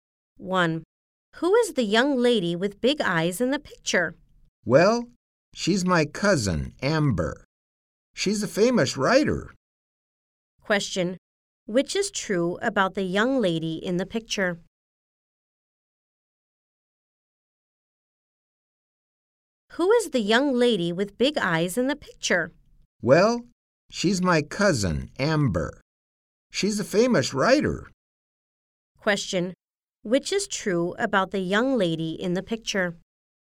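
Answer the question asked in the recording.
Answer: She is the speaker's cousin Amber, a famous writer.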